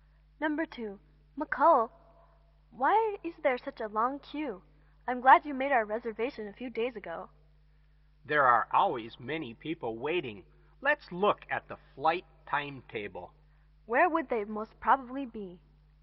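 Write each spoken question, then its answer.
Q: Where would they most probably be?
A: At the airport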